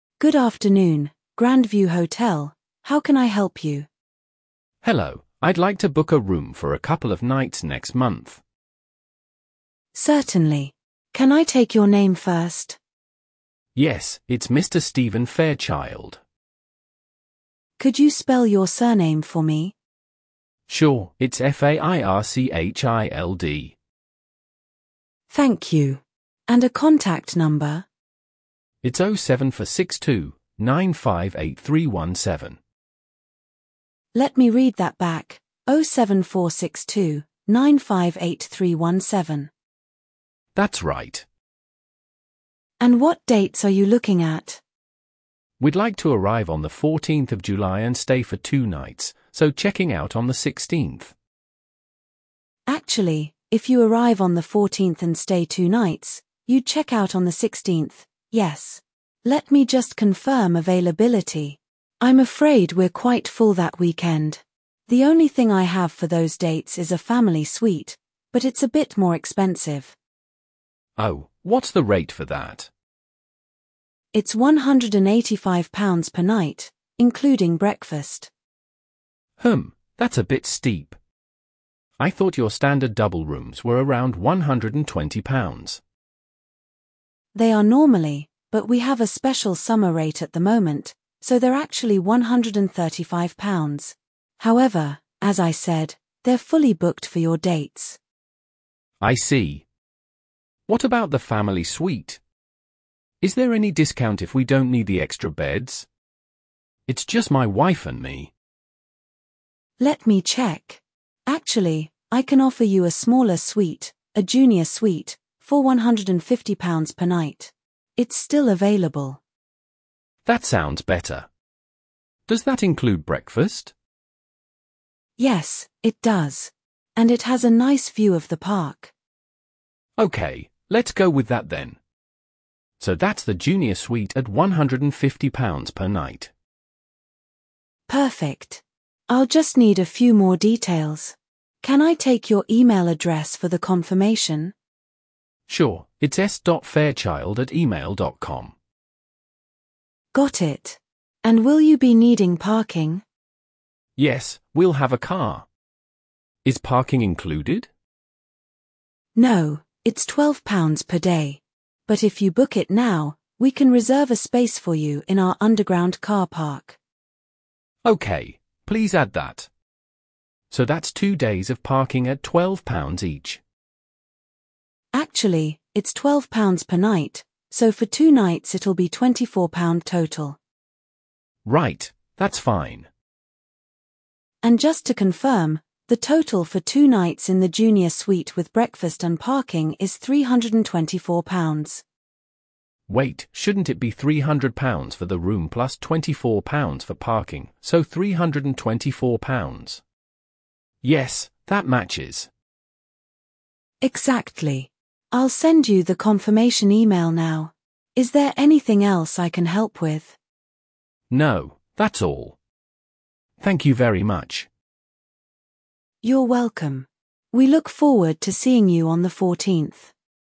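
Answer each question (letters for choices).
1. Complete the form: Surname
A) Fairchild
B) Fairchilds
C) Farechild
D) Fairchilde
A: A

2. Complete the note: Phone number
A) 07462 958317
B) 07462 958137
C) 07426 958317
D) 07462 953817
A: A

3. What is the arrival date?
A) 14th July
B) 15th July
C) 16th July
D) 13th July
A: A

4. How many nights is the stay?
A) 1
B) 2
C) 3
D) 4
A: B

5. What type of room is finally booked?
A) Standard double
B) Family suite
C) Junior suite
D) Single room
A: C

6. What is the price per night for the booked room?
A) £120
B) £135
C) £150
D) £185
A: C

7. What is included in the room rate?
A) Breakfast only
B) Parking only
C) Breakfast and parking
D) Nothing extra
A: A

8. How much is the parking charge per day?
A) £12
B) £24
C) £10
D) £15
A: A

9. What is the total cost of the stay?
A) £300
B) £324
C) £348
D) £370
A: B

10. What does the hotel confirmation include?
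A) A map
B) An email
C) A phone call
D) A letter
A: B

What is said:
Receptionist: Good afternoon, Grandview Hotel, how can I help you?
Caller: Hello, I'd like to book a room for a couple of nights next month.
Receptionist: Certainly. Can I take your name first?
Caller: Yes, it's Mr. Stephen Fairchild.
Receptionist: Could you spell your surname for me?
Receptionist: Thank you. And a contact number?
Caller: It's 07462 958317.
Receptionist: Let me read that back: 07462 958317.
Caller: That's right.
Receptionist: And what dates are you looking at?
Caller: We'd like to arrive on the 14th of July and stay for two nights, so checking out on the 16th.
Receptionist: Actually, if you arrive on the 14th and stay two nights, you'd check out on the 16th, yes. Let me just confirm availability... I'm afraid we're quite full that weekend. The only thing I have for those dates is a family suite, but it's a bit more expensive.
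Caller: Oh, what's the rate for that?
Receptionist: It's £185 per night, including breakfast.
Caller: Hmm, that's a bit steep. I thought your standard double rooms were around £120.
Receptionist: They are normally, but we have a special summer rate at the moment, so they're actually £135. However, as I said, they're fully booked for your dates.
Caller: I see. What about the family suite? Is there any discount if we don't need the extra beds? It's just my wife and me.
Receptionist: Let me check... Actually, I can offer you a smaller suite, a junior suite, for £150 per night. It's still available.
Caller: That sounds better. Does that include breakfast?
Receptionist: Yes, it does. And it has a nice view of the park.
Caller: Okay, let's go with that then. So that's the junior suite at £150 per night.
Receptionist: Perfect. I'll just need a few more details. Can I take your email address for the confirmation?
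Caller: Sure, it's s.fairchild@email.com.
Receptionist: Got it. And will you be needing parking?
Caller: Yes, we'll have a car. Is parking included?
Receptionist: No, it's £12 per day. But if you book it now, we can reserve a space for you in our underground car park.
Caller: Okay, please add that. So that's two days of parking at £12 each.
Receptionist: Actually, it's £12 per night, so for two nights it'll be £24 total.
Caller: Right, that's fine.
Receptionist: And just to confirm, the total for two nights in the junior suite with breakfast and parking is £324.
Caller: Wait, shouldn't it be £300 for the room plus £24 for parking, so £324? Yes, that matches.
Receptionist: Exactly. I'll send you the confirmation email now. Is there anything else I can help with?
Caller: No, that's all. Thank you very much.
Receptionist: You're welcome. We look forward to seeing you on the 14th.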